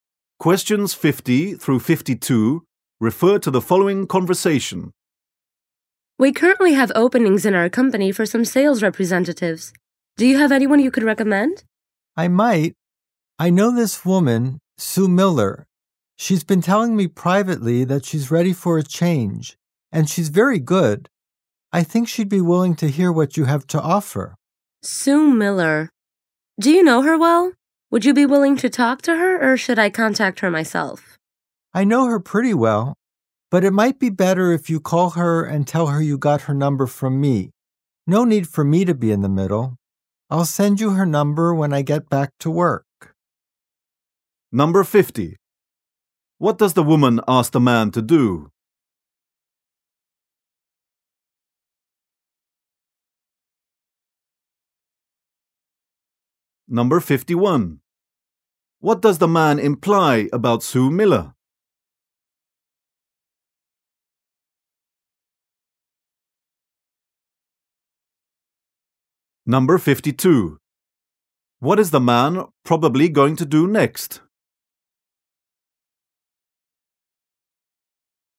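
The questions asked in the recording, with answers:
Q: What does the woman ask the man to do?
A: Recommend someone for a sales job

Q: What does the man imply about Sue Miller?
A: She wants to change jobs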